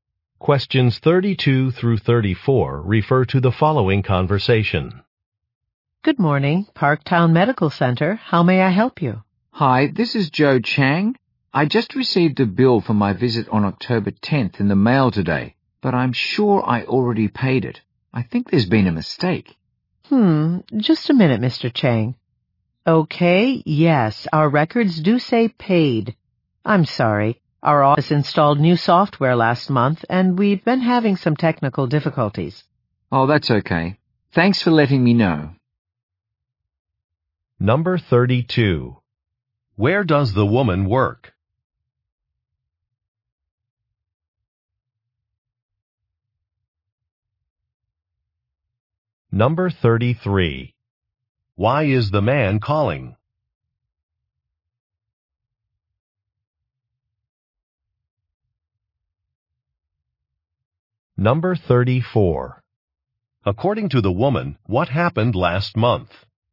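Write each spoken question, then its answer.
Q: Where does the woman work?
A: At Parktown Medical Center

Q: Why is the man calling?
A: He received a bill he had already paid

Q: According to the woman, what happened last month?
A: The office installed new software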